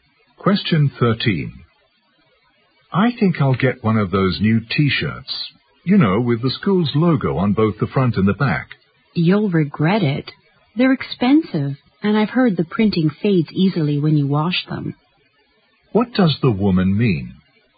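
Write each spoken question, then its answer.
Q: What does the woman mean?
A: The man shouldn't buy the T-shirt because it's expensive and the printing fades.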